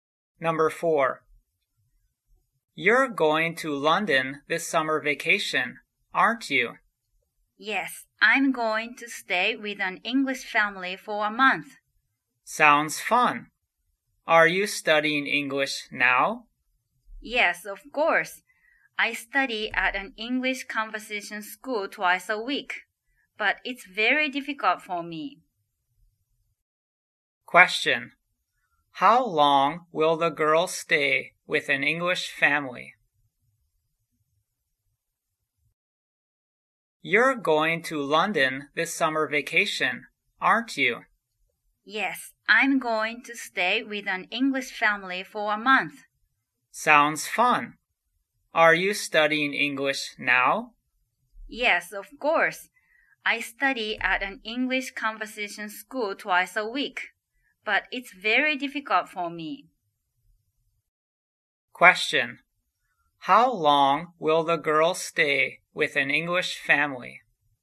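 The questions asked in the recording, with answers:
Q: How long will the girl stay with an English family?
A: For a month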